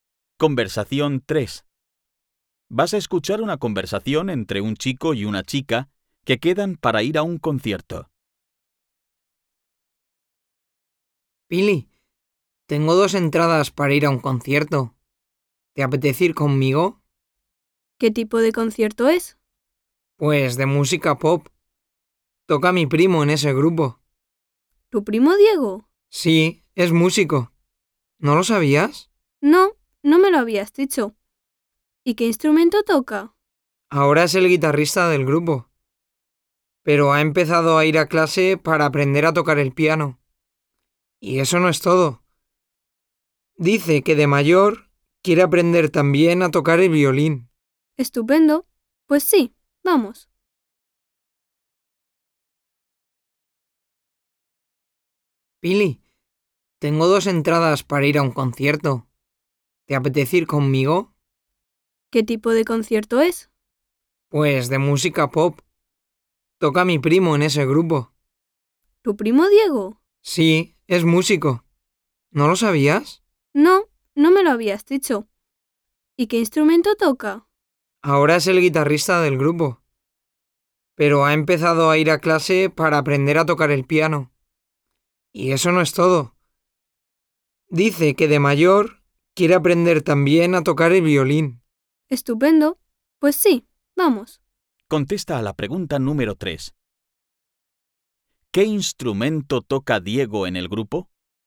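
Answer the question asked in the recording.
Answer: La guitarra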